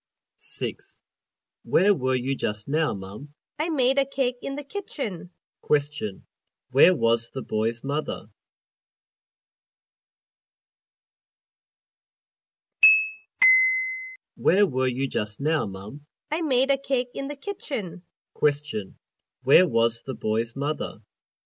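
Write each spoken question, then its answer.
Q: Where was the boy's mother?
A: In the kitchen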